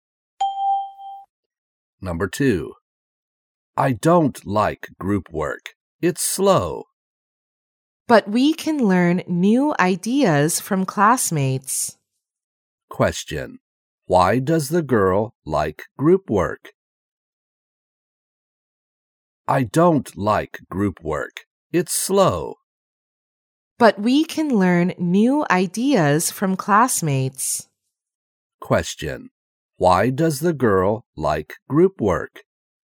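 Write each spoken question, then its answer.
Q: Question.Why does the girl like group work?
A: Because they can learn new ideas from classmates.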